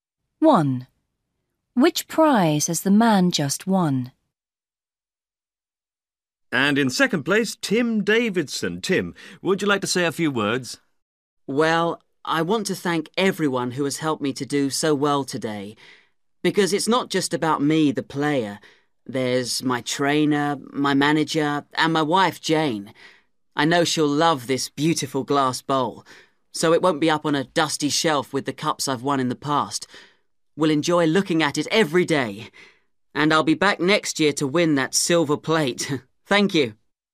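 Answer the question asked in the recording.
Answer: a glass bowl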